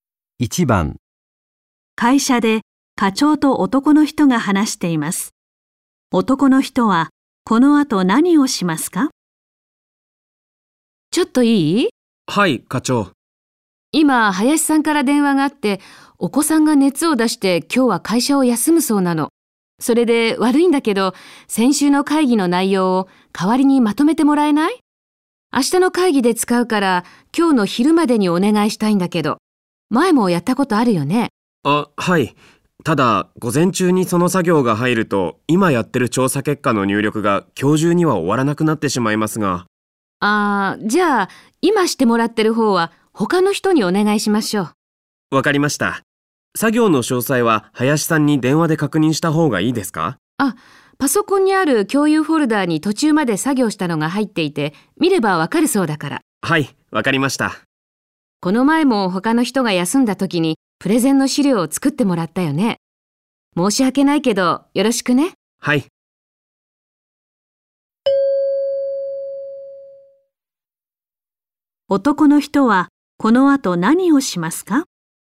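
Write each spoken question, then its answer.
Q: 男の人はこの後何をしますか?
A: 先週の会議の内容をまとめる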